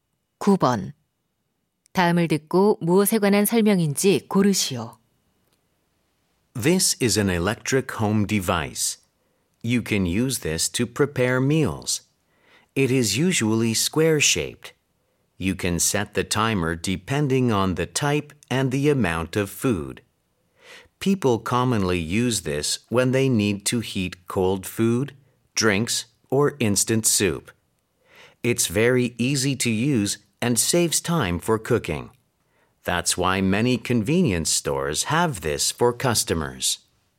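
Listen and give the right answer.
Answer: 전자레인지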